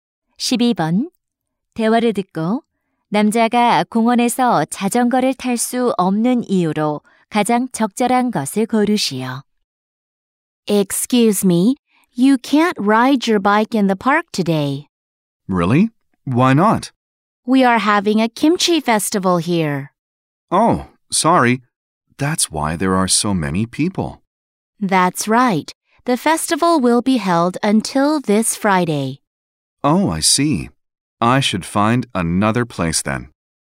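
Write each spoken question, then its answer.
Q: 대화를 듣고 남자가 공원에서 자전거를 탈 수 없는 이유로 가장 적절한 것을 고르시오.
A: 김치 축제가 열려서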